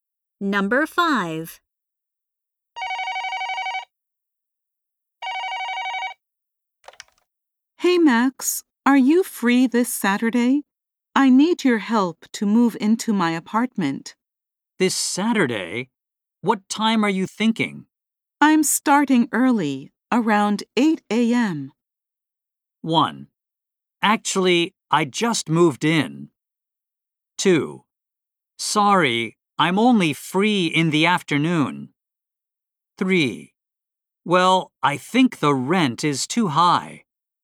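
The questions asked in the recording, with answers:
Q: I'm starting early, around 8 a.m.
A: 2: Sorry, I'm only free in the afternoon.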